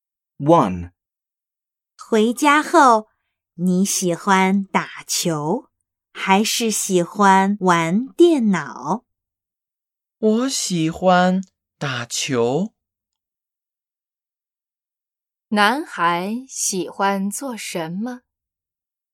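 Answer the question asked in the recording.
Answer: 打球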